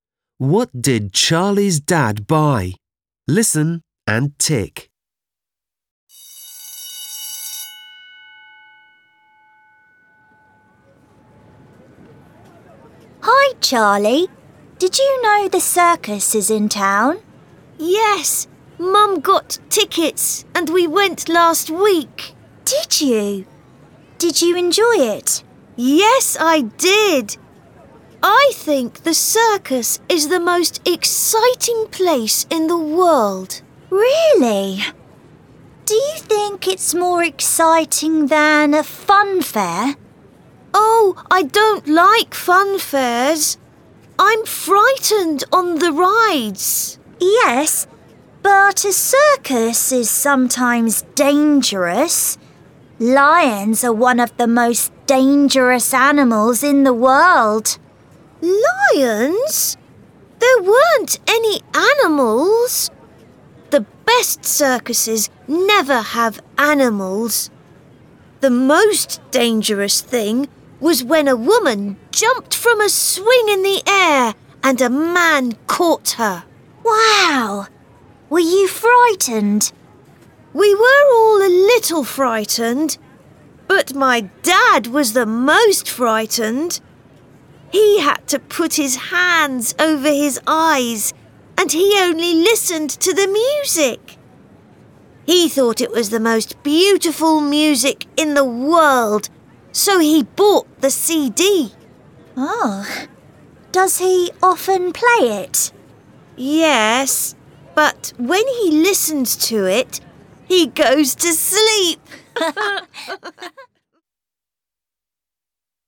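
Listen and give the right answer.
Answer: the CD of the circus music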